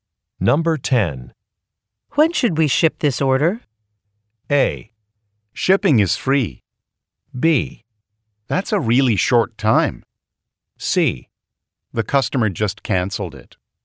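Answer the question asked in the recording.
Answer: C: The customer just canceled it.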